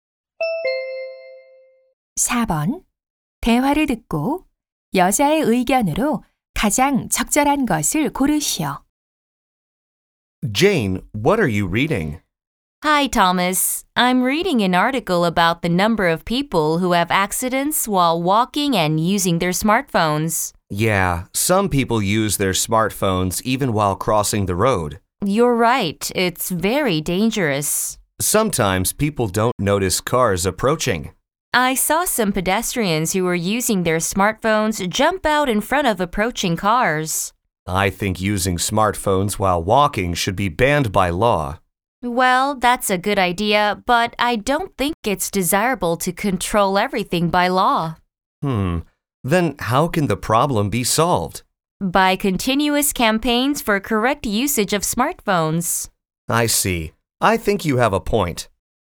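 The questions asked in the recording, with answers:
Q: 대화를 듣고 여자의 의견으로 가장 적절한 것을 고르시오.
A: 스마트폰 올바른 사용 캠페인을 꾸준히 해야 한다 (걸으며 스마트폰 사용 문제를 법으로 규제하는 것보다)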